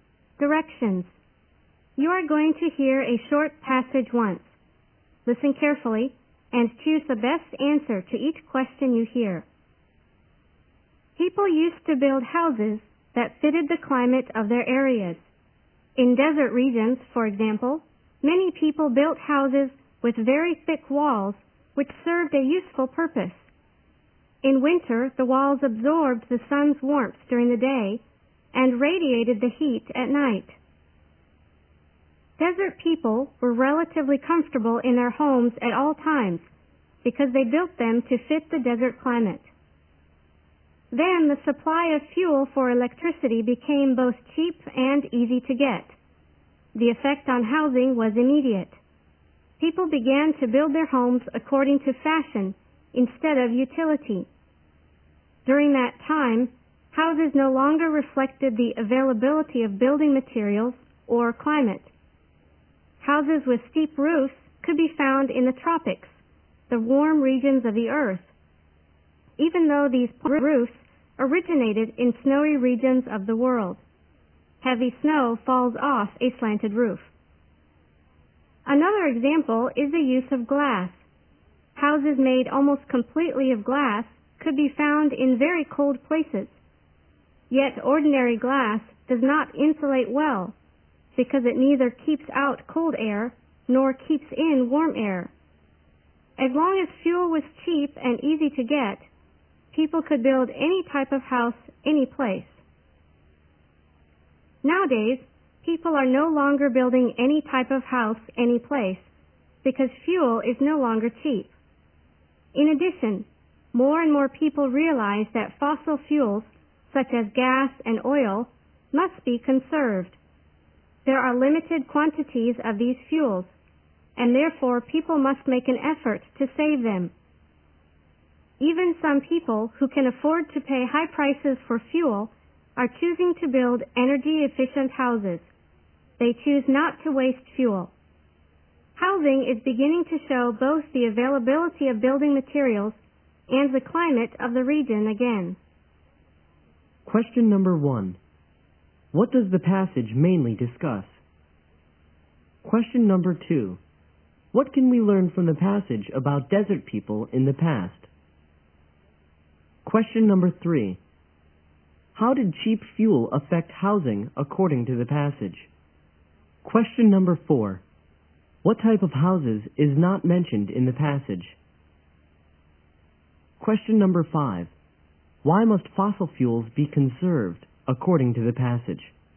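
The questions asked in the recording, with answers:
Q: What does the passage mainly discuss?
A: How housing has reflected (or stopped reflecting) climate and fuel availability

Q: What can we learn from the passage about desert people in the past?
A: They built houses with thick walls suited to the desert climate and were comfortable in them

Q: How did cheap fuel affect housing according to the passage?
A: People built houses according to fashion instead of utility

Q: Why must fossil fuels be conserved according to the passage?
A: There are limited quantities of them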